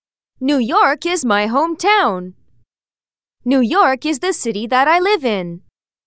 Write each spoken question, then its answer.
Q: New York is my hometown. New York is the city that I live in.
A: Different is the correct answer.